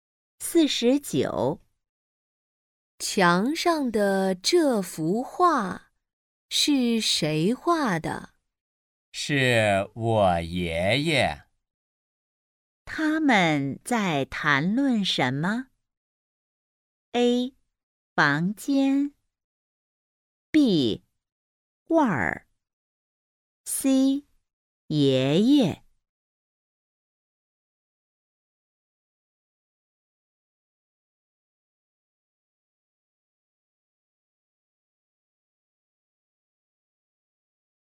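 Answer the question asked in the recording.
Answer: B: 画儿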